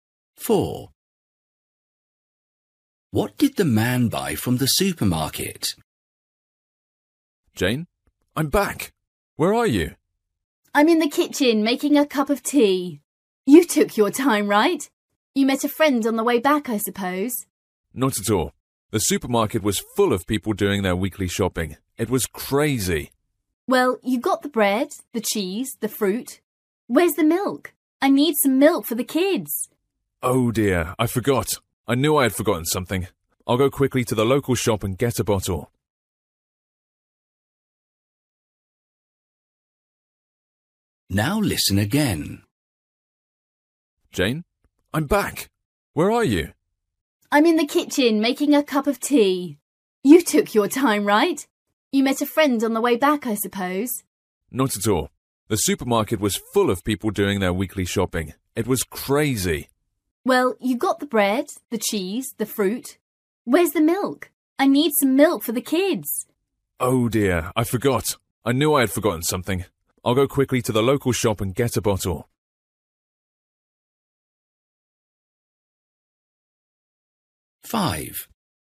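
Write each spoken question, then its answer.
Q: What did the man buy from the supermarket?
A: Bread, cheese and fruit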